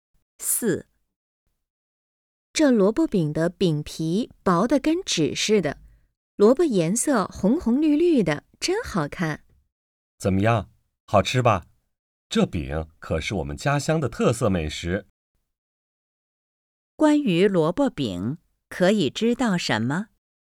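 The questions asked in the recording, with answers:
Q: 关于萝卜饼,可以知道什么?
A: 是家乡的特色美食,饼皮很薄,颜色好看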